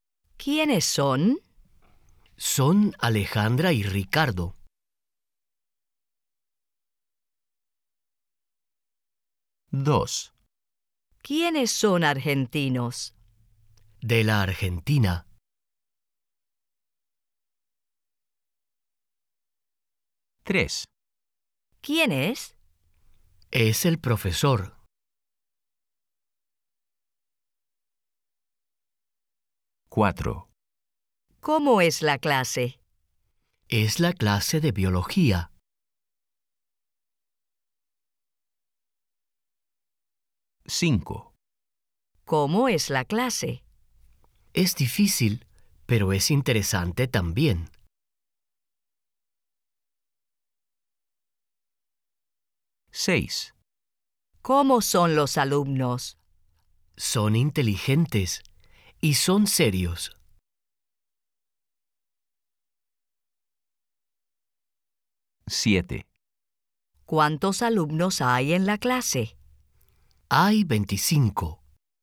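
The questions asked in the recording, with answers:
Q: ¿Quiénes son?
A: Sí

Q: ¿Quiénes son argentinos?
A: No

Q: ¿Quién es?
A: Sí

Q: ¿Cómo es la clase?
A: No

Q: ¿Cómo es la clase?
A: Sí

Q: ¿Cómo son los alumnos?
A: Sí

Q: ¿Cuántos alumnos hay en la clase?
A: Sí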